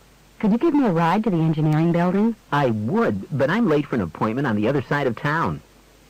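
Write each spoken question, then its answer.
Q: What does the man mean?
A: He can't give the woman a ride.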